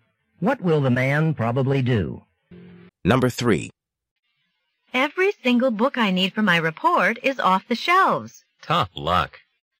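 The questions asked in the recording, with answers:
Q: What does the man mean?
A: The woman is unlucky that the books she needs are all checked out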